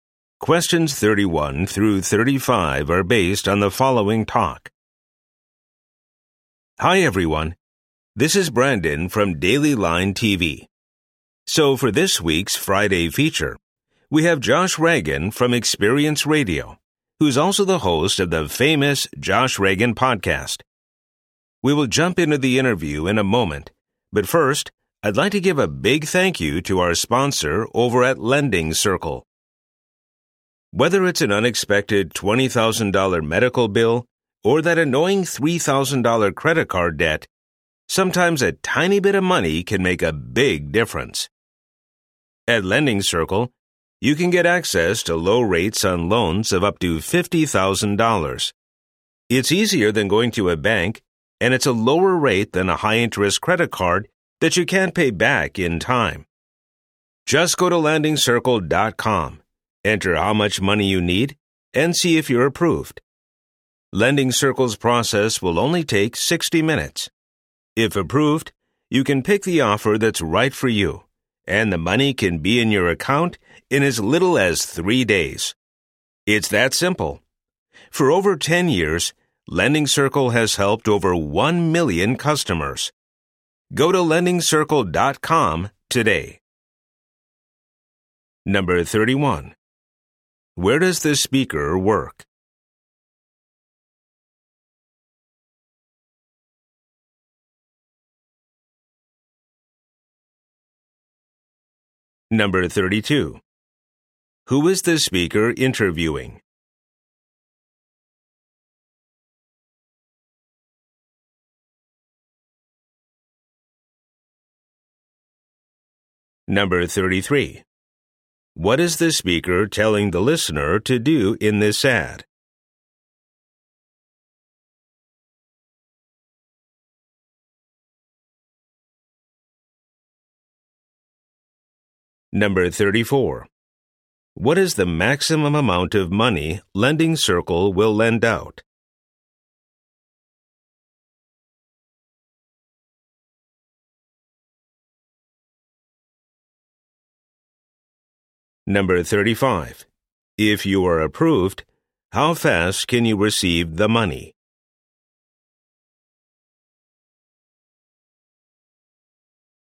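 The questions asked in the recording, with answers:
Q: Where does the speaker work?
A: Daily Line TV

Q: Who is the speaker interviewing?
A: Josh Reagan

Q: What is the maximum amount of money Lending Circle will lend out?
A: $50,000

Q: If you are approved, how fast can you receive the money?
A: In as little as 3 days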